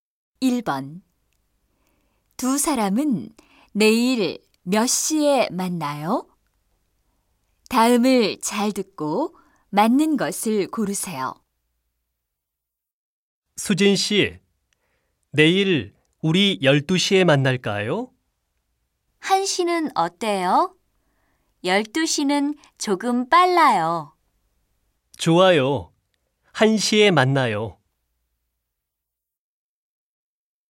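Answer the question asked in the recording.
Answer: 1시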